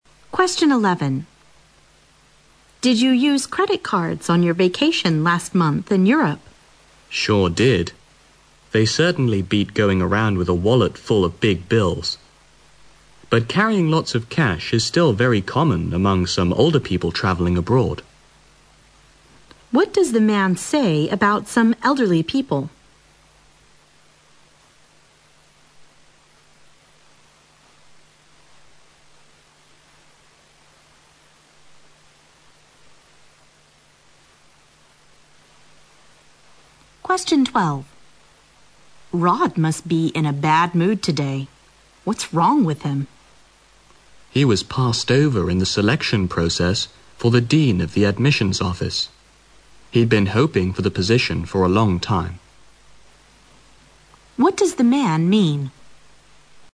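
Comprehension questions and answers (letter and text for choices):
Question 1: What does the man say about some elderly people?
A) They would rather travel around than stay at home.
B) They prefer to carry cash when traveling abroad.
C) They usually carry many things around with them.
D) They don't like to spend much money on traveling.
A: B) They prefer to carry cash when traveling abroad.

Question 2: What does the man mean?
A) The selection process was a little unfair.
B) He had long dreamed of the dean's position.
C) Rod was eliminated in the selection process.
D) Rod was in charge of the admissions office.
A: C) Rod was eliminated in the selection process.

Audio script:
W: Did you use credit cards on your vacation last month in Europe?
M: Sure I did. They certainly beat going around with a wallet full of big bills. But carrying lots of cash is still very common among some older people traveling abroad.
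Q: What does the man say about some elderly people?
W: Rod must be in a bad mood today. What's wrong with him?
M: He was passed over in the selection process for the dean of the admissions office. He'd been hoping for the position for a long time.

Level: 六级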